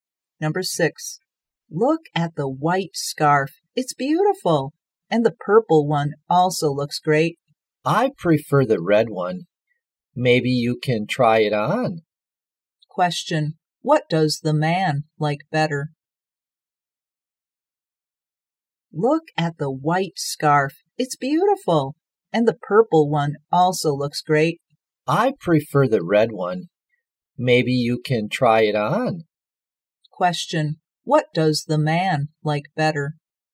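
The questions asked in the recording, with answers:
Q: Question,What does the man like better?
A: The red scarf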